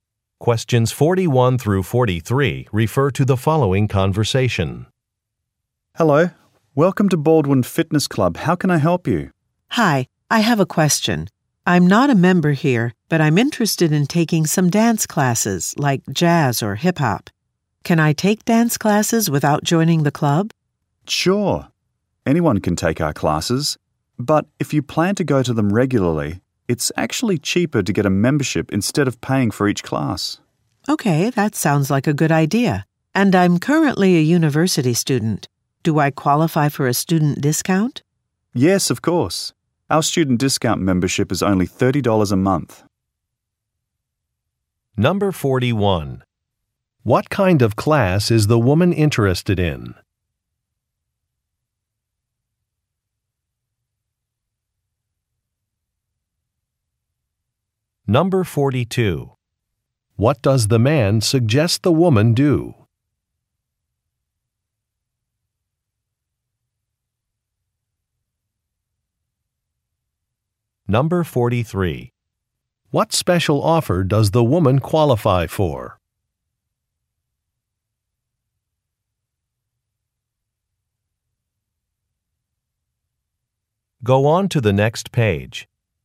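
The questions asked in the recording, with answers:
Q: What kind of class is the woman interested in?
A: Dance

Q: What does the man suggest the woman do?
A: Get a membership

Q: What special offer does the woman qualify for?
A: A student discount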